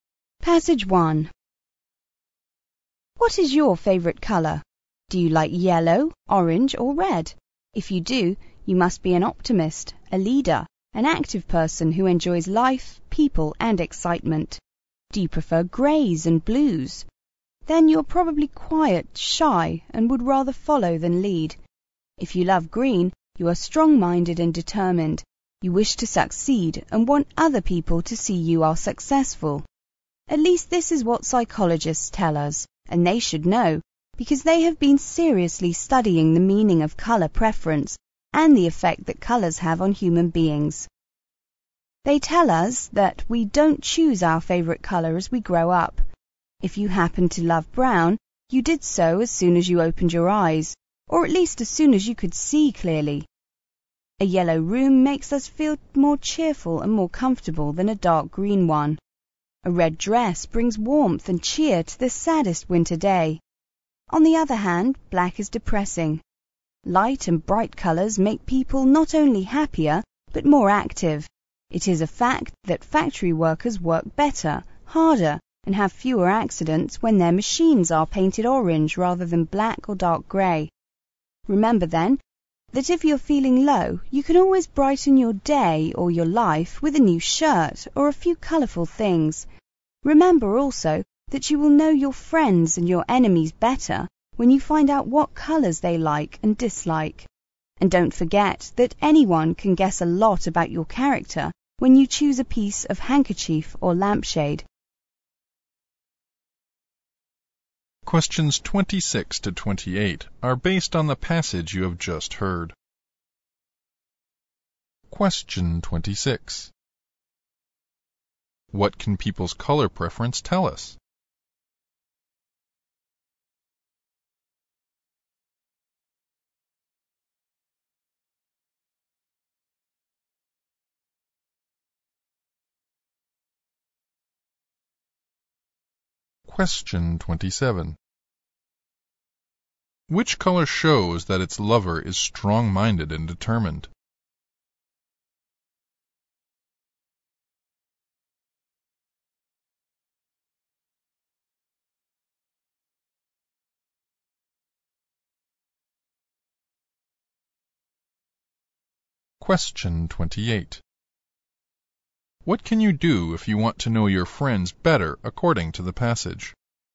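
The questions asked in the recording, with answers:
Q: What can people's color preference tell us?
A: Their character

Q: Which color shows that its lover is strong-minded and determined?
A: Green

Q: What can you do if you want to know your friends better according to the passage?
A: Find out what colors they like and dislike.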